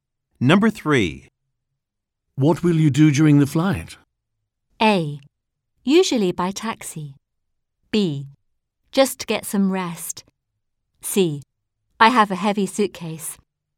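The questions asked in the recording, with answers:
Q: What will you do during the flight?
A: B: Just get some rest.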